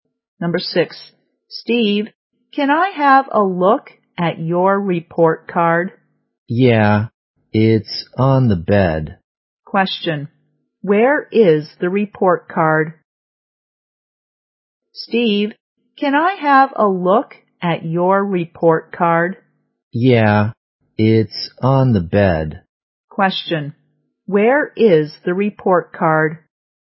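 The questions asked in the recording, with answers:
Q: Question. Where is the report card?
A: On the bed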